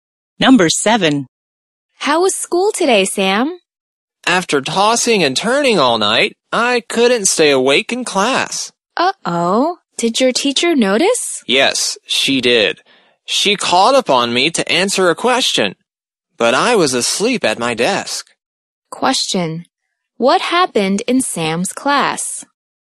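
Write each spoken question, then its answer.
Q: What happened in Sam's class?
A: He fell asleep and the teacher called on him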